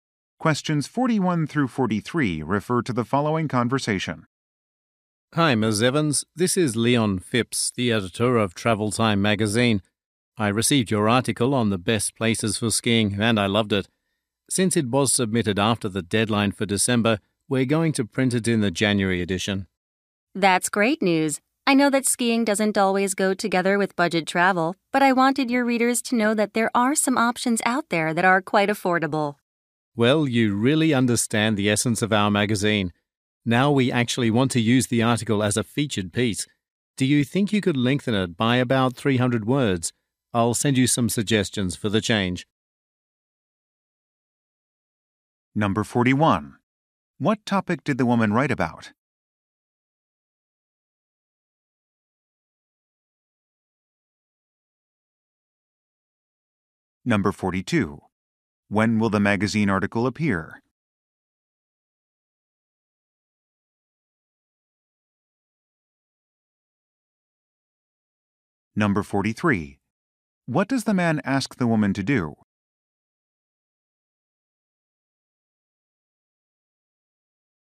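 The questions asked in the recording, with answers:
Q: What topic did the woman write about?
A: Affordable places for skiing

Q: When will the magazine article appear?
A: In January

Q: What does the man ask the woman to do?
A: Make the article about 300 words longer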